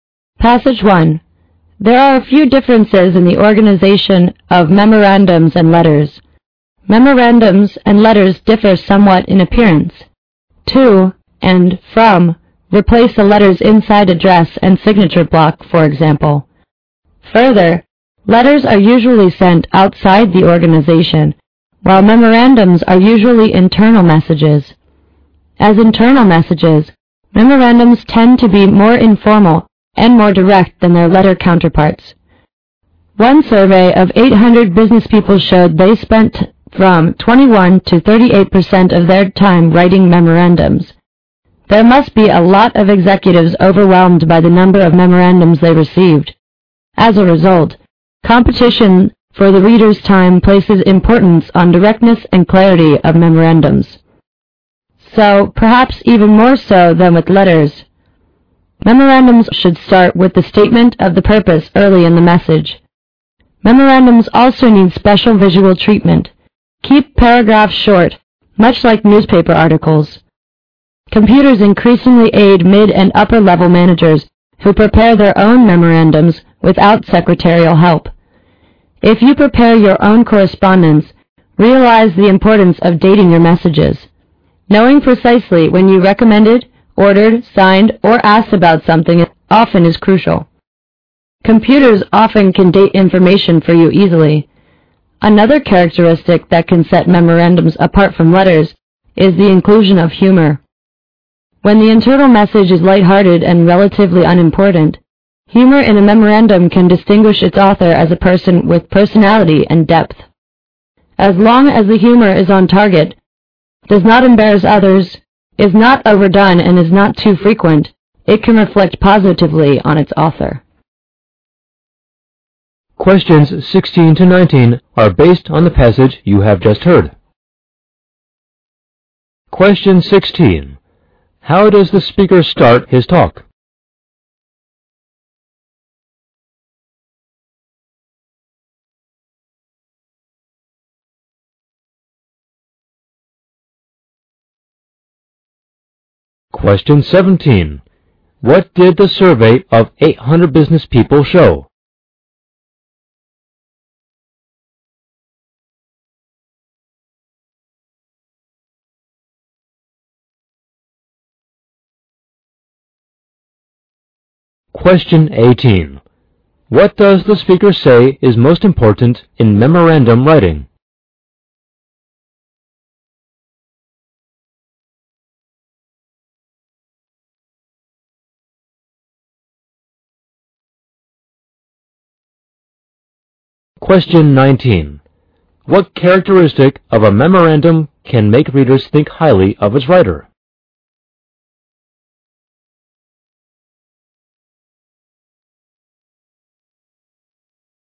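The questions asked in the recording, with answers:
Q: How does the speaker start his talk?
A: By pointing out differences between memorandums and letters

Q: What did the survey of 800 business people show?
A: They spent 21 to 38% of their time writing memorandums

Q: What does the speaker say is most important in memorandum writing?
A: Directness and clarity / stating the purpose early

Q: What characteristic of a memorandum can make readers think highly of its writer?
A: Humor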